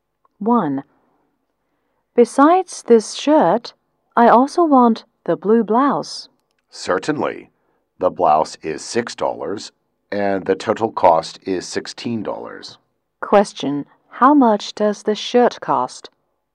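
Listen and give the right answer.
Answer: $10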